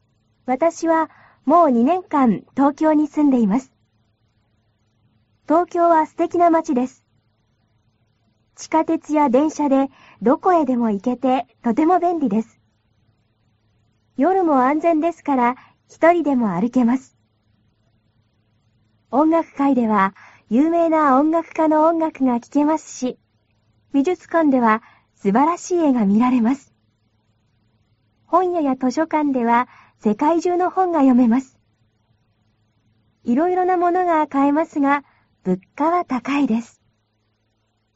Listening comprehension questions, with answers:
ひらがなで書いてください。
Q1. 地下鉄や電車でどこへでも.....................て、とても便利です。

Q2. 夜も安全ですから、一人でも.....................ます。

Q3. 音楽会では、有名な音楽家の音楽が.....................ますし、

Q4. 美術館では、すばらしい絵が.....................ます。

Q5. 本屋や図書館では、世界中の本が.....................ます。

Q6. いろいろなものが.....................ますが、物価は高いです。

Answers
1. いけ
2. あるけ
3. きけ
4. みられ
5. よめ
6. かえ

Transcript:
地下鉄や電車でどこへでもいけて、とても便利です。夜も安全ですから、一人でもあるけます。音楽会では、有名な音楽家の音楽がきけますし、美術館では、すばらしい絵がみられます。本屋や図書館では、世界中の本がよめます。いろいろなものがかえますが、物価は高いです。

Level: cơ bản